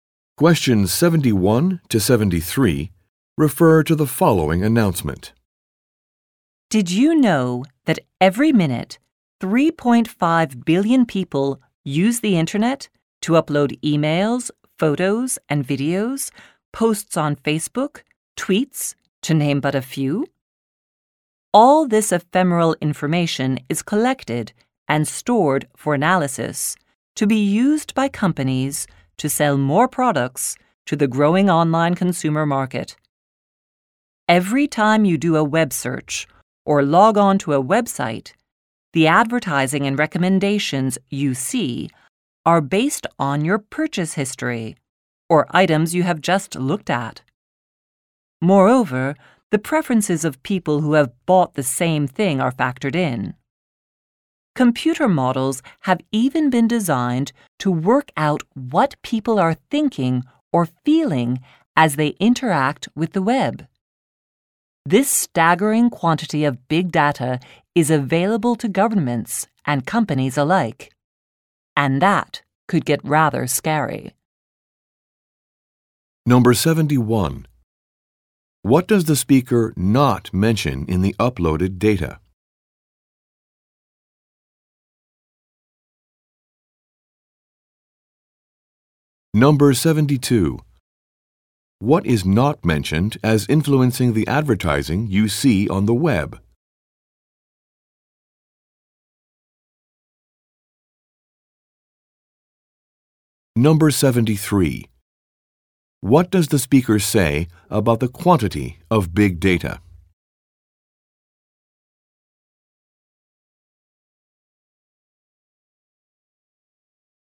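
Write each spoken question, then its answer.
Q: What does the speaker say about the quantity of big data?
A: It is staggering, and it is available to governments and companies, which could be rather scary.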